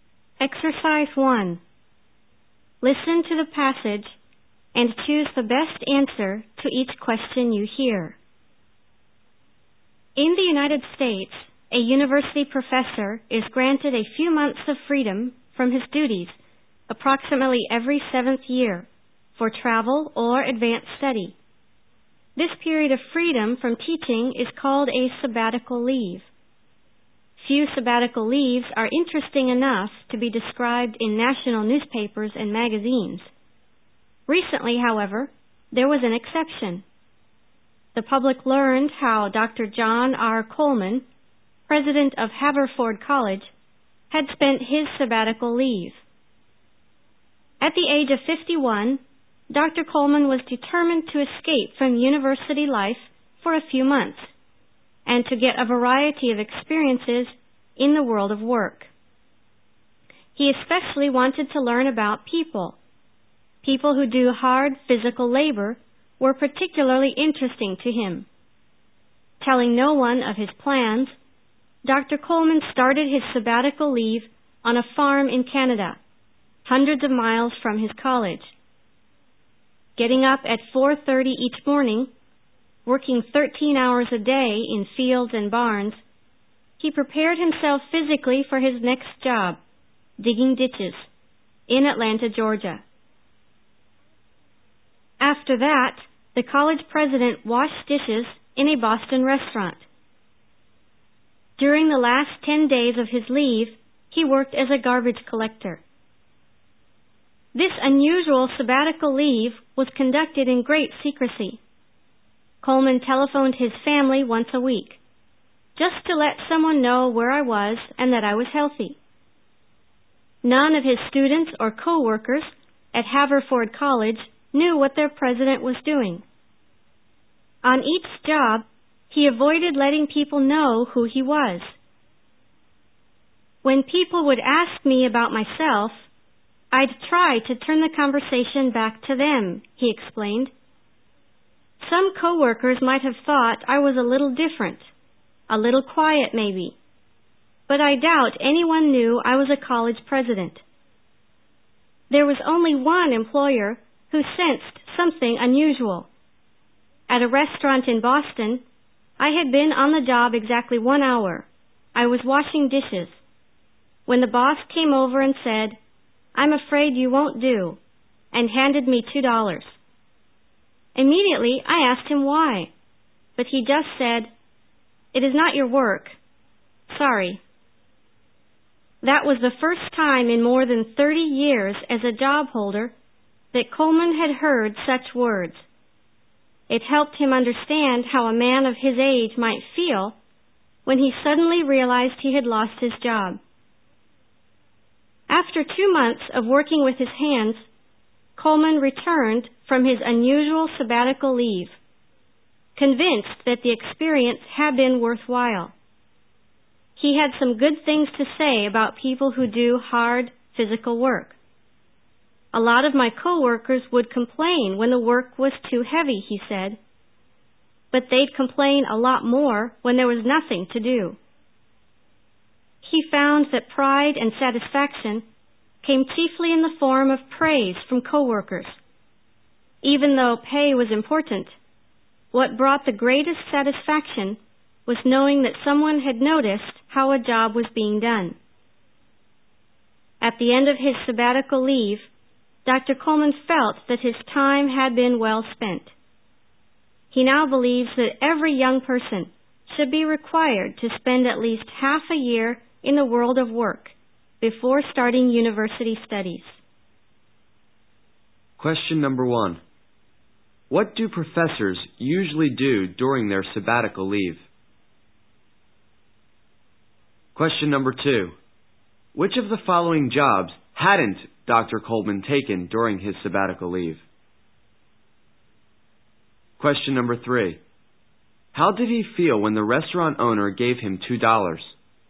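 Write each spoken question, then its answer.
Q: What do professors usually do during their sabbatical leave?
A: They travel or do advanced study.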